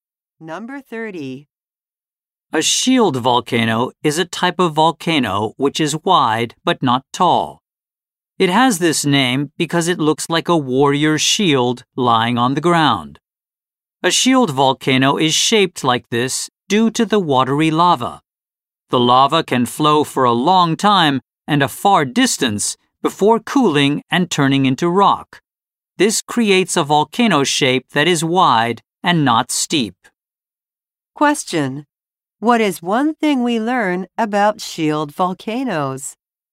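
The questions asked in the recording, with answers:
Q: What is one thing we learn about shield volcanoes?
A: They are wide but not tall because of watery lava.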